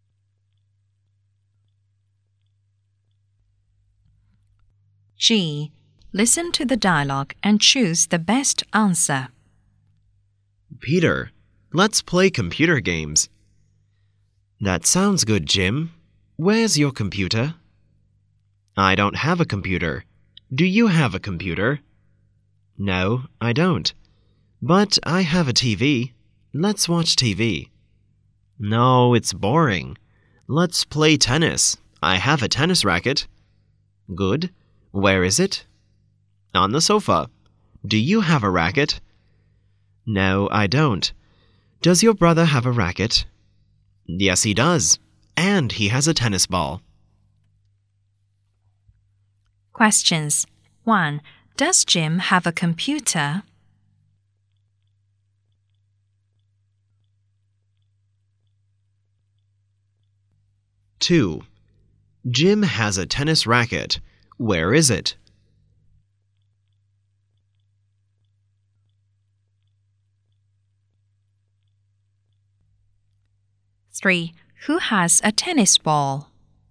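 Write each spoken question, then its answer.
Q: Does Jim have a computer?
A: No, he doesn't

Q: Where is it?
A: On the sofa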